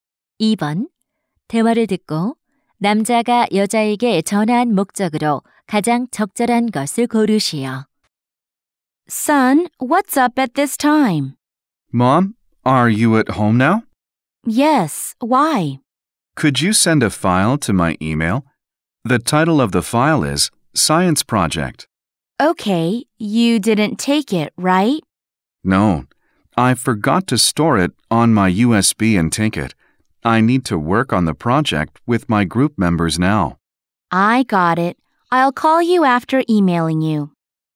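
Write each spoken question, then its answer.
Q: 2번 대화를 듣고 남자가 여자에게 전화한 목적으로 가장 적절한 것을 고르시오.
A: 이메일로 파일(과학 프로젝트)을 보내 달라고 부탁하려고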